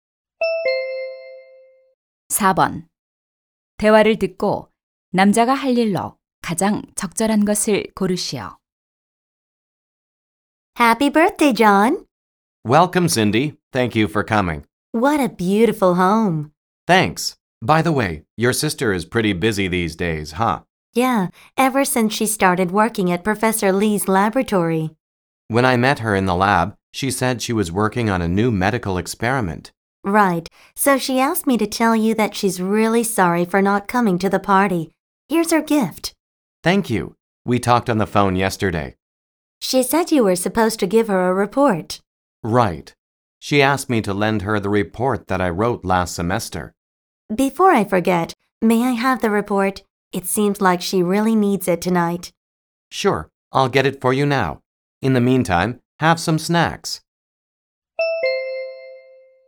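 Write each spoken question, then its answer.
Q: 대화를 듣고 남자가 할 일로 가장 적절한 것을 고르시오.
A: 보고서를 가져다주기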